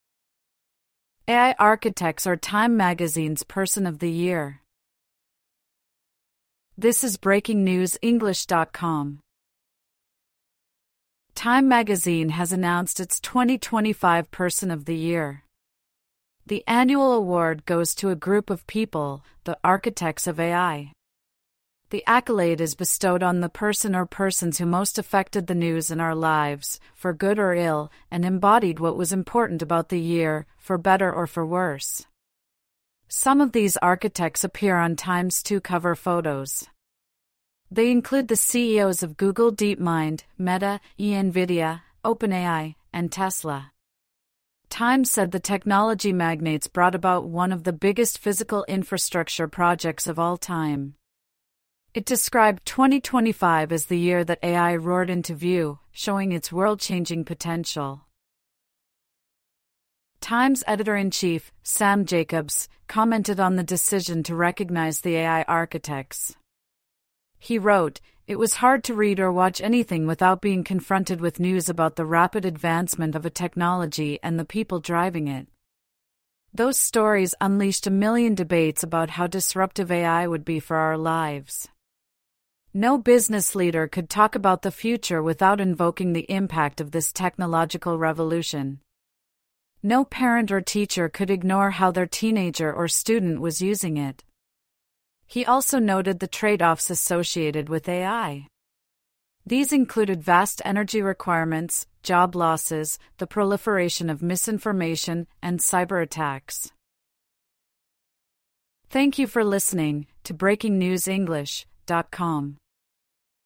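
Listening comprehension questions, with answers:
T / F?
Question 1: The TIME Person of the Year is the person who invented AI.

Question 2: The Person of the Year is only for people who have benefitted the world.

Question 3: TIME said magnets were responsible for infrastructure projects.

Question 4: TIME said 2025 is the year AI showed its potential to change the world.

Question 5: An editor at TIME suggested news of AI was pretty much ubiquitous.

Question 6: The editor said he wanted one million debates on AI.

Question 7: The editor said parents could not ignore how teenagers were using AI.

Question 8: The editor suggested a downside to AI was the energy it required.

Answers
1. F
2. F
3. F
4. T
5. T
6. F
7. T
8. T

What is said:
AI 'architects' are TIME magazine's Person of the Year
TIME magazine has announced its 2025 Person of the Year. The annual award goes to a group of people: the "architects of AI". 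The accolade is bestowed on "the person or persons who most affected the news and our lives, for good or ill, and embodied what was important about the year, for better or for worse". Some of these architects appear on TIME's two cover photos. They include the CEOs of Google DeepMind, Meta, Nvidia, OpenAI, and Tesla. TIME said the technology magnates brought about "one of the biggest physical infrastructure projects of all time." It described 2025 as the year that AI "roared into view," showing its world-changing potential.
TIME's editor-in-chief, Sam Jacobs, commented on the decision to recognize the AI architects. He wrote: "It was hard to read or watch anything without being confronted with news about the rapid advancement of a technology and the people driving it. Those stories unleashed a million debates about how disruptive AI would be for our lives. No business leader could talk about the future without invoking the impact of this technological revolution. 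No parent or teacher could ignore how their teenager or student was using it." He also noted the "trade-offs" associated with AI. These included vast energy requirements, job losses, the proliferation of misinformation, and cyberattacks.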